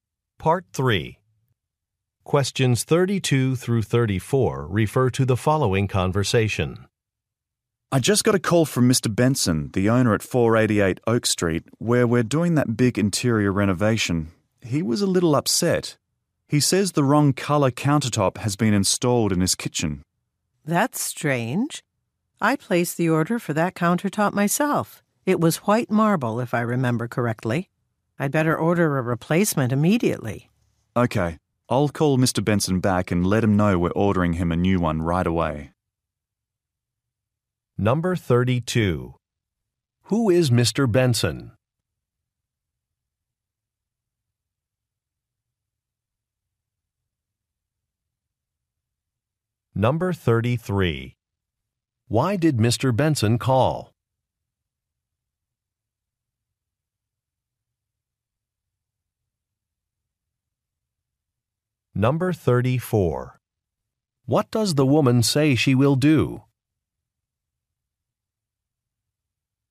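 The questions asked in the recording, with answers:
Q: Who is Mr. Benson?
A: A homeowner whose house is being renovated (a client)

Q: Why did Mr. Benson call?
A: The wrong colour countertop was installed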